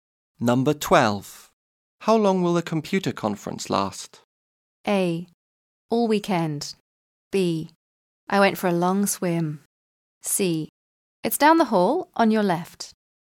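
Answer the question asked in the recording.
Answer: A: All weekend.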